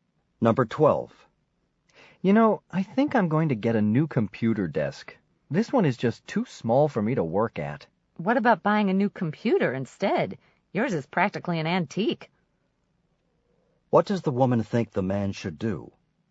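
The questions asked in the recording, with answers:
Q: What does the woman think the man should do?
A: Buy a new computer.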